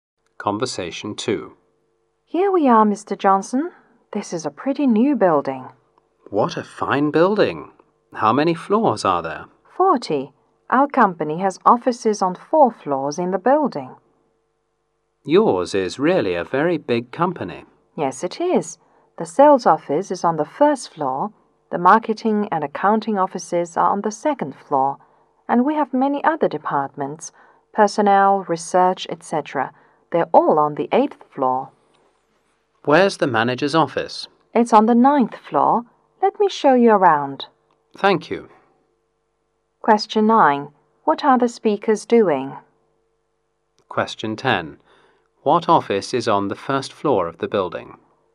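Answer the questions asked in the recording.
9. Showing a visitor around the company's building
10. The sales office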